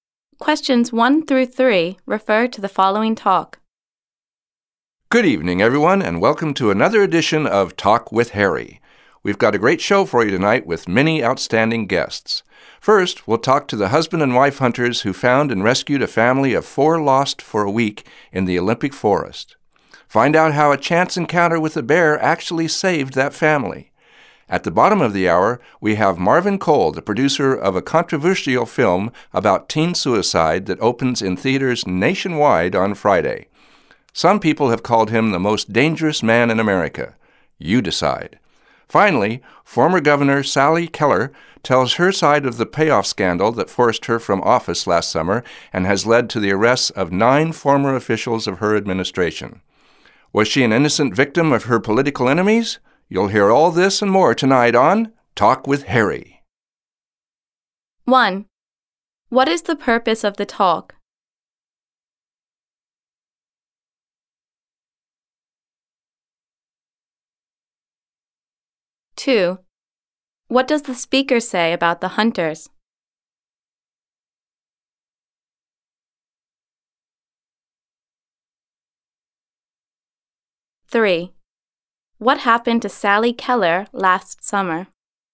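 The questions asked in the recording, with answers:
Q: What is the purpose of the talk?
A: To introduce tonight's show and its guests

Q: What does the speaker say about the hunters?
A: They found and rescued a lost family of four

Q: What happened to Sally Keller last summer?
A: She was forced from office by a payoff scandal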